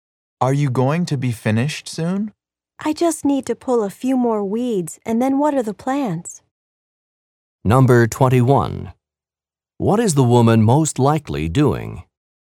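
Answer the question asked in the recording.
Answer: Gardening.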